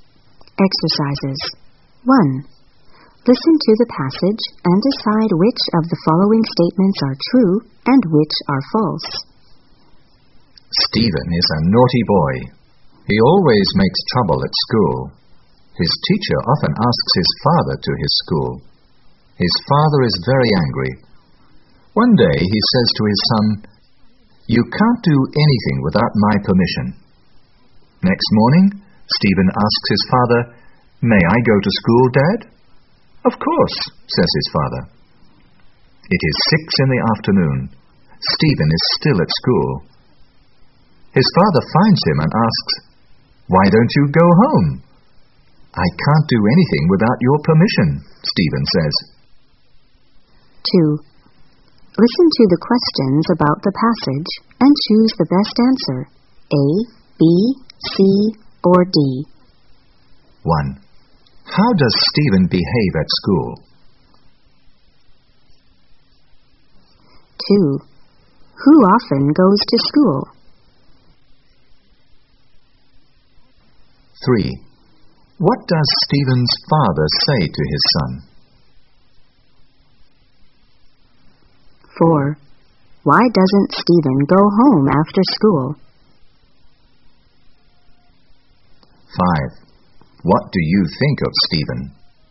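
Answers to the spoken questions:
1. He is naughty and always makes trouble.
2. Stephen's father
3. You can't do anything without my permission.
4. He says he can't do anything without his father's permission.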